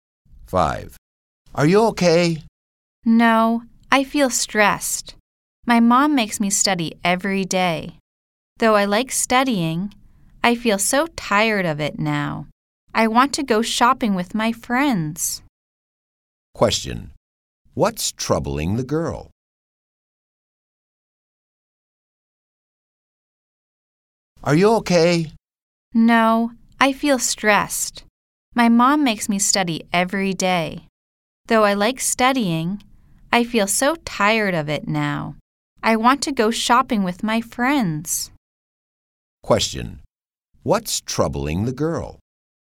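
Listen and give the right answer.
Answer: Her mom makes her study every day, so she feels stressed.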